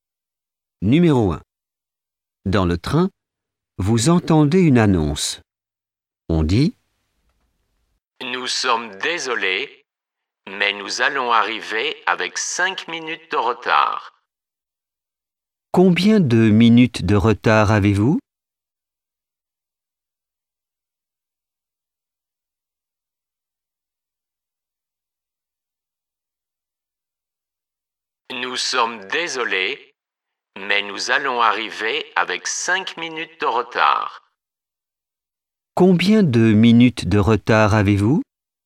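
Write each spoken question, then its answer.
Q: Combien de minutes de retard avez-vous ?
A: 5 minutes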